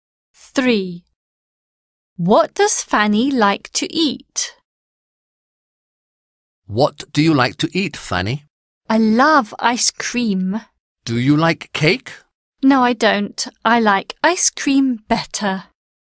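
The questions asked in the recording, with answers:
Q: What does Fanny like to eat?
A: Ice cream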